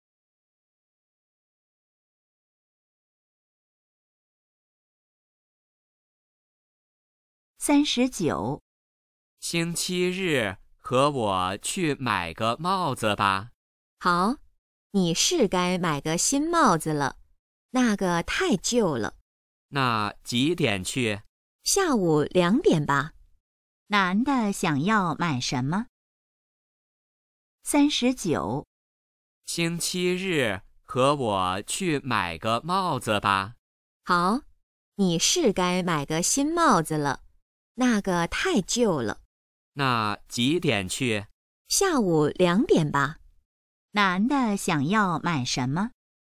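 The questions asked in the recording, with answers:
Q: 男的想要买什么?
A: 帽子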